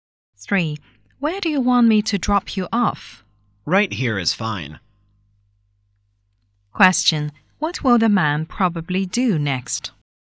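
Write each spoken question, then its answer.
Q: What will the man probably do next?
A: Get out of the car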